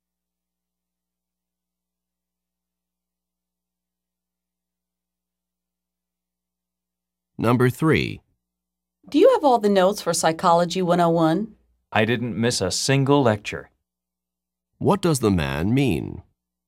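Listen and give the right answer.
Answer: He has all the notes because he attended every lecture.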